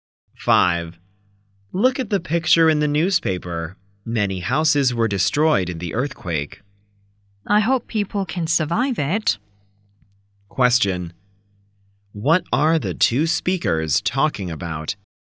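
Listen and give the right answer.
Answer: An earthquake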